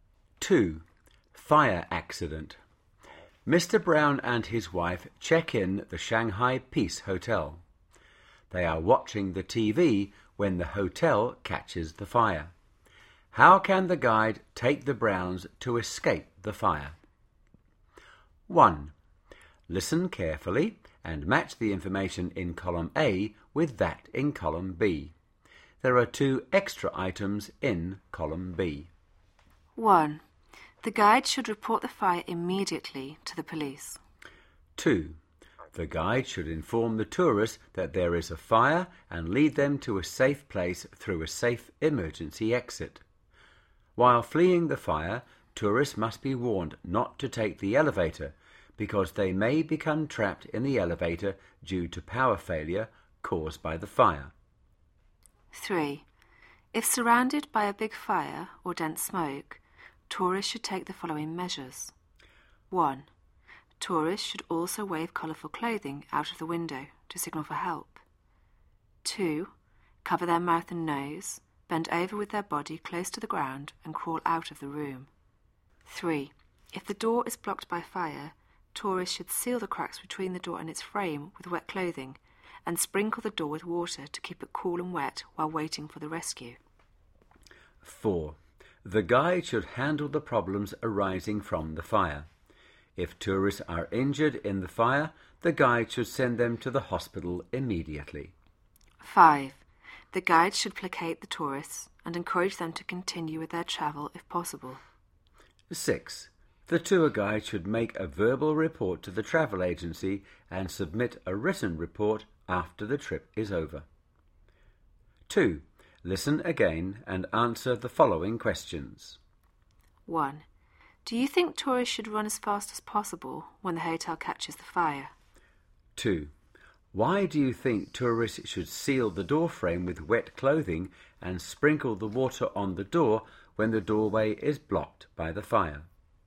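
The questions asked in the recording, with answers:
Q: Why do you think tourists should seal the door frame with wet clothing and sprinkle the water on the door when the doorway is blocked by the fire?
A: To keep the door cool and wet while waiting for rescue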